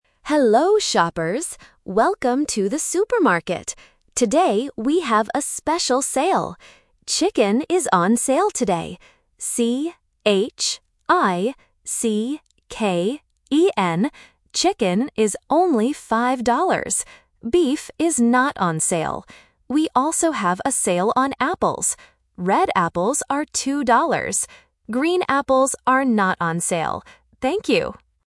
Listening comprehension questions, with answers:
Listen to the supermarket announcement and choose the correct answer (A, B, or C) for each question.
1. What meat is on sale today?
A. Beef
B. Chicken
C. Pork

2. How does the announcer spell the meat on sale?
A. C-H-I-K-E-N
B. C-H-I-C-E-N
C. C-H-I-C-K-E-N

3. What color are the apples on sale?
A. Red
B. Green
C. Yellow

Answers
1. B. Chicken
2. C. C-H-I-C-K-E-N
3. A. Red

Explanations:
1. The announcer explicitly says, "Chicken is on sale today." Option (A) Beef is The Trap: beef is mentioned, but the announcer says "Beef is not on sale." Option (C) Pork is not mentioned in the audio.
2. The announcer spells the word for the meat very clearly: "C-H-I-C-K-E-N". Options (A) and (B) are common spelling mistakes for this word.
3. The announcer says, "Red apples are two dollars." Option (B) Green is The Trap: green apples are mentioned, but the announcer says "Green apples are not on sale." Option (C) Yellow is a plausible apple color but is not mentioned in the audio.

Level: A1

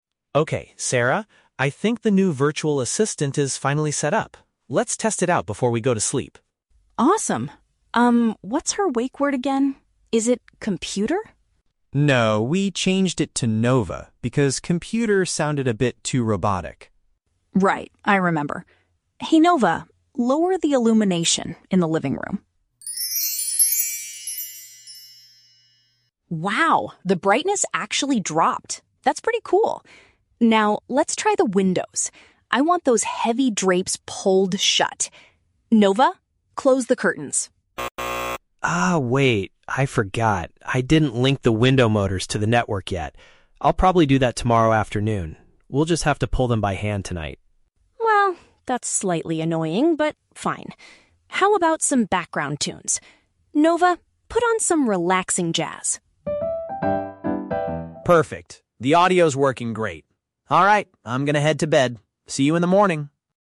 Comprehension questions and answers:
Listen to a conversation between two roommates and choose the correct answer (A, B, or C) for each question.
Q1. Why did the roommates choose "Nova" as the name for their virtual assistant?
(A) It was the system's original default setting.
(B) They felt the other option was unnatural.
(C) Mark forgot how to pronounce the old name.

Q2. What is the current situation with the window coverings?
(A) The virtual assistant successfully shut them.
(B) The roommates have to close them manually.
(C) Sarah will connect them to the system tonight.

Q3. What does Mark decide to do immediately after the music starts playing?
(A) He decides to go to sleep.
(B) He fixes the window motors.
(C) He turns off the lights.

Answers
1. (B) They felt the other option was unnatural.
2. (B) The roommates have to close them manually.
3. (A) He decides to go to sleep.

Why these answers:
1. In the audio, Mark says they didn't use "Computer" because it sounded "too robotic" (which means unnatural).
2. Mark says they will have to "pull them by hand tonight," which is a paraphrase of closing them manually.
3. After the jazz music plays, Mark says, "I'm going to head to bed" (which means to go to sleep).

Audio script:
Mark: Okay, Sarah, I think the new virtual assistant is finally set up. Let's test it out before we go to sleep.
Sarah: Awesome. Um, what's her wake word again? Is it "Computer"?
Mark: No, we changed it to "Nova" because "Computer" sounded a bit too robotic.
Sarah: Right, I remember. Hey Nova, lower the illumination in the living room.
Sarah: Wow, the brightness actually dropped. That's pretty cool. Now, let's try the windows. I want those heavy drapes pulled shut. Nova, close the curtains.
Mark: Ah, wait. I forgot. I didn't link the window motors to the network yet. I'll probably do that tomorrow afternoon. We'll just have to pull them by hand tonight.
Sarah: Well, that's slightly annoying, but fine. How about some background tunes? Nova, put on some relaxing jazz.

